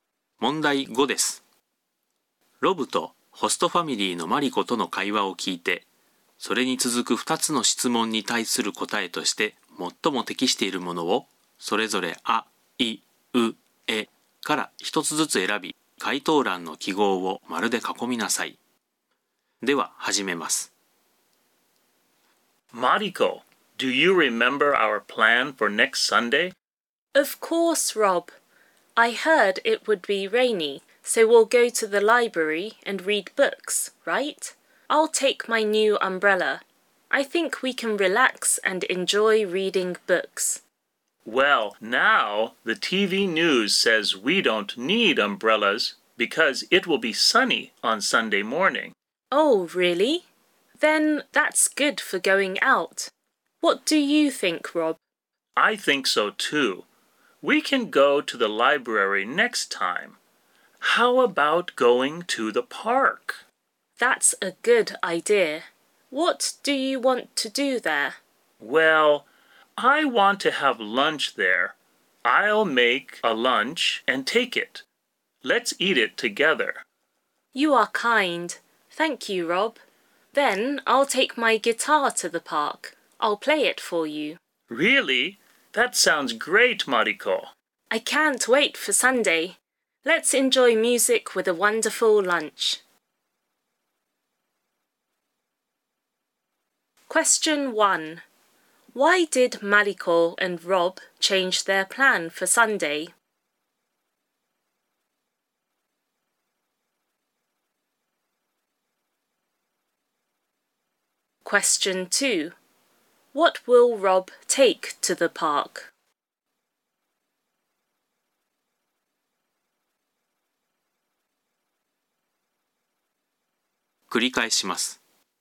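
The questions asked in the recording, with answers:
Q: Question 1. Why did Mariko and Rob change their plan for Sunday?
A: Because the TV news said it will be sunny on Sunday morning.

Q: Question 2. What will Rob take to the park?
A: A lunch he will make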